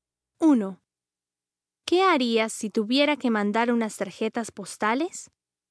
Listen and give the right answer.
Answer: Iría a la oficina de correos.